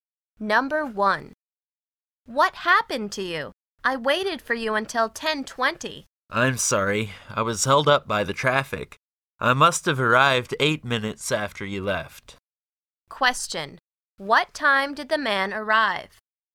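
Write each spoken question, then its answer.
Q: What time did the man arrive?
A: 10:28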